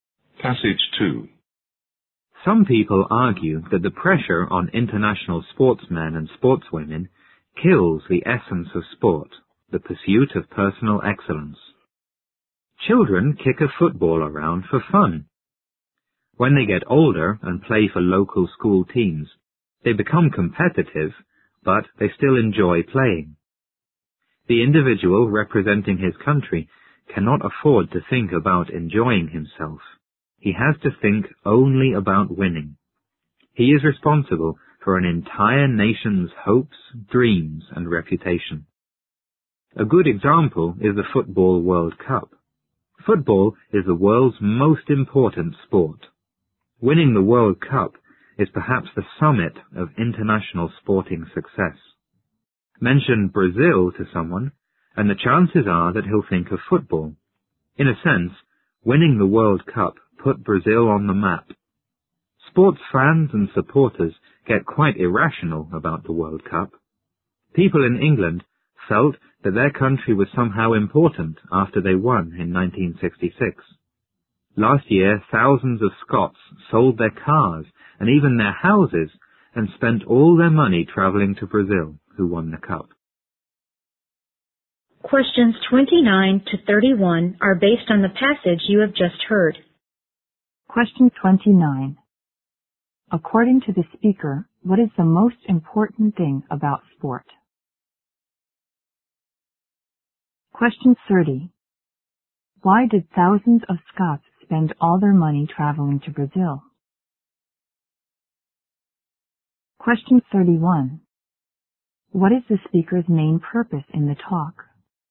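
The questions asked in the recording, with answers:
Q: According to the speaker, what is the most important thing about sport?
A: The pursuit of personal excellence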